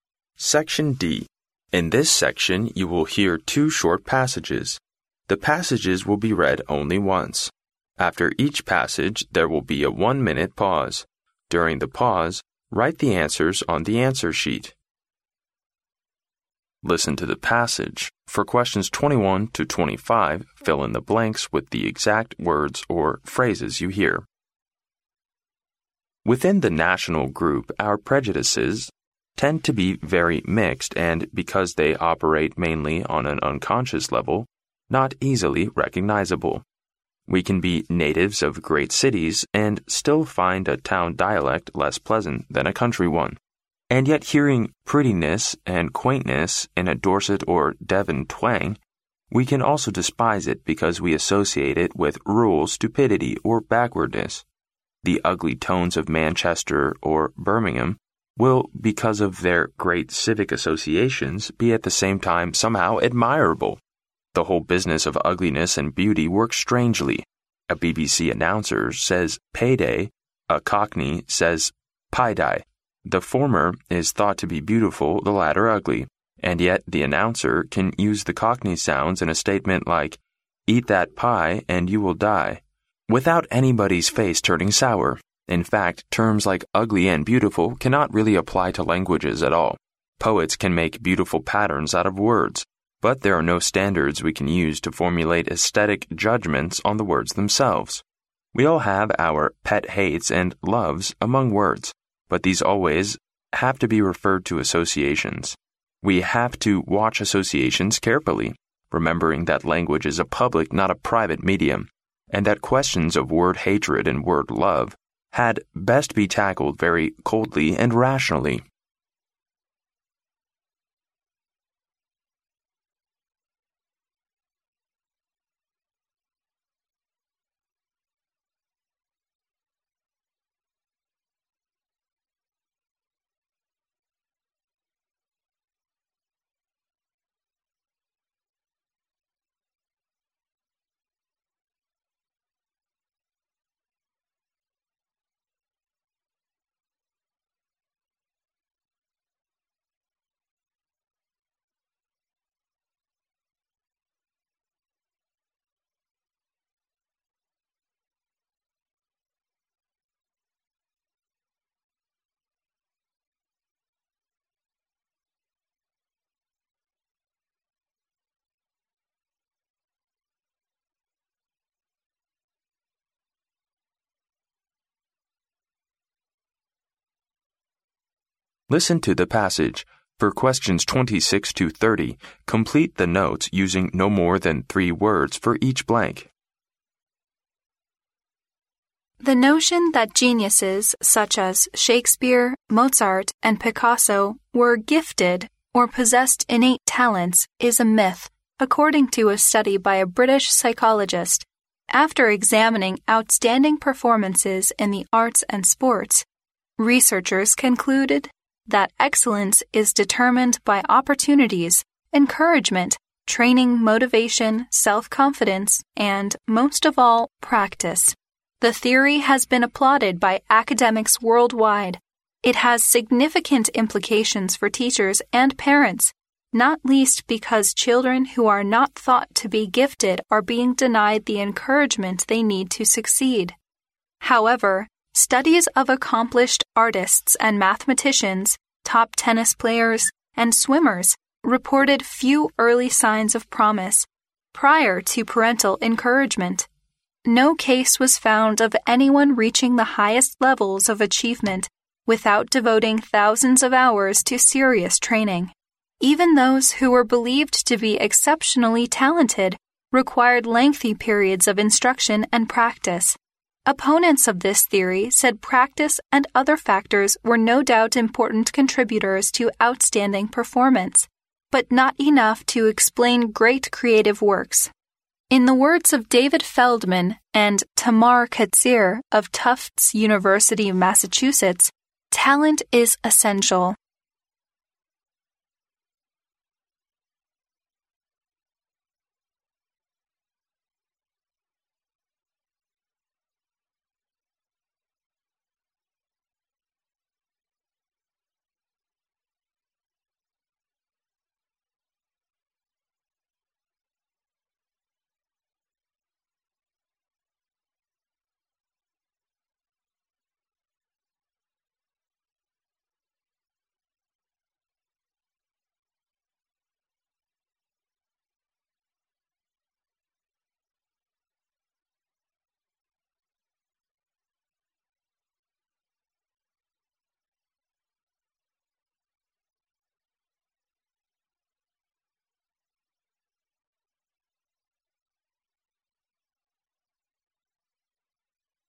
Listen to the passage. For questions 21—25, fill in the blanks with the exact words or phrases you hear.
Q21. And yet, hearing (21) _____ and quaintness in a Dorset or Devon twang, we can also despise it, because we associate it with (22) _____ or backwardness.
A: prettiness

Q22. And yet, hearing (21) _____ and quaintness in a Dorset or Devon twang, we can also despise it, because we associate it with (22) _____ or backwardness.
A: rural stupidity

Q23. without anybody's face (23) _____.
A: turning sour

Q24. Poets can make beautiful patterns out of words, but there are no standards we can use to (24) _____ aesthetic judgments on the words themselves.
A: formulate

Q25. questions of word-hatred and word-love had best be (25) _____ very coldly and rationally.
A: tackled

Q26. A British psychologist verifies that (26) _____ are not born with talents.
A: geniuses

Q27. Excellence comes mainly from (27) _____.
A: practice

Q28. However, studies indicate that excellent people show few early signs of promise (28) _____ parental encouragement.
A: prior to

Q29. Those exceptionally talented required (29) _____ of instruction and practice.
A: lengthy periods

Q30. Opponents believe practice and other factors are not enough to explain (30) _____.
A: great creative works

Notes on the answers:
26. 录音中提到英国一位心理学家的研究表明,像莎士比亚这样的天才都是有天赋的,这种说法就如同神话一样是不真实的。所以此处填geniuses。
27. 录音中提到excellence is determined...—most of all—practice,说明一个人的优秀主要取决于练习。
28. 录音中提到However, studies of accomplished artists and mathematicians, top tennis player and swimmers reported few early signs of promise prior to parental encouragement,说明通过对优秀人士的研究,发现他们在受到父母的鼓励之前并没有显露出多少成为优秀人士的潜力。

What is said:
In this section, you will hear two short passages. The passages will be read only once. After each passage, there will be a one-minute pause. During the pause, write the answers on the answer sheet.
Listen to the passage. For questions 21—25, fill in the blanks with the exact words or phrases you hear.
Within the national group, our prejudices tend to be very mixed and, because they operate mainly on an unconscious level, not easily recognizable. We can be natives of great cities and still find a town dialect less pleasant than a country one. And yet, hearing prettiness and quaintness in a Dorset or Devon twang, we can also despise it, because we associate it with rural stupidity or backwardness. The ugly tones of Manchester or Birmingham will, because of their great civic associations, be at the same time somehow admirable. The whole business of ugliness and beauty works strangely. A BBC announcer says "pay day"; a Cockney says "pie die". The former is thought to be beautiful, the latter ugly, and yet the announcer can use the Cockney sounds in a statement like "Eat that pie and you will die" without anybody's face turning sour. In fact, terms like "ugly" and "beautiful" cannot really apply to languages at all. Poets can make beautiful patterns out of words, but there are no standards we can use to formulate aesthetic judgments on the words themselves. We all have our pet hates and loves among words, but these always have to be referred to associations. We have to watch associations carefully, remembering that language is a public, not a private, medium, and that questions of word-hatred and word-love had best be tackled very coldly and rationally.
For questions 26—30, complete the notes using no more than three words for each blank.